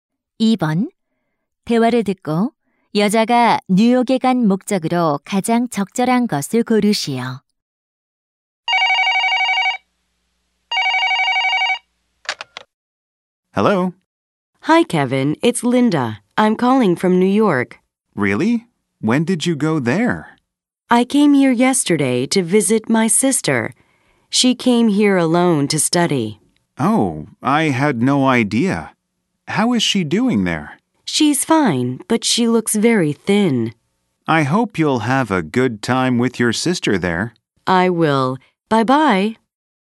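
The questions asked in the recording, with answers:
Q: 대화를 듣고 여자가 뉴욕에 간 목적으로 가장 적절한 것을 고르시오.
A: 여동생(언니)을 방문하기 위해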